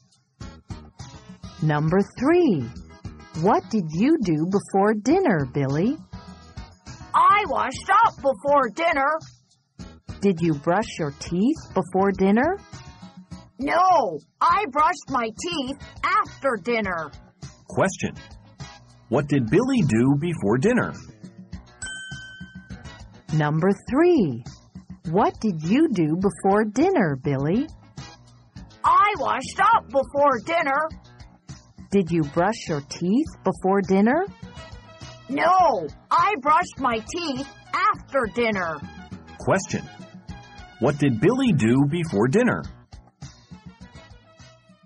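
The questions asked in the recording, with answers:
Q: What did Billy do before dinner?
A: He washed up before dinner.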